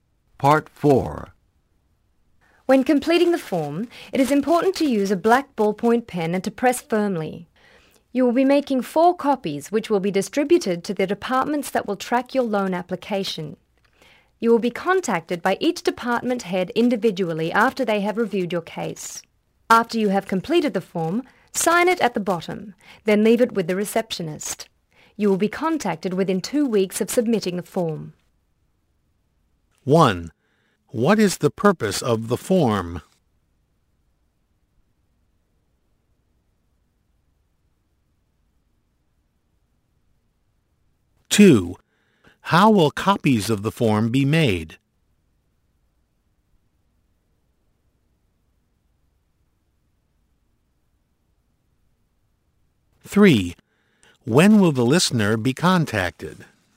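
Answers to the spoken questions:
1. To apply for a loan
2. By pressing firmly with a black ballpoint pen
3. Within 2 weeks of submitting the form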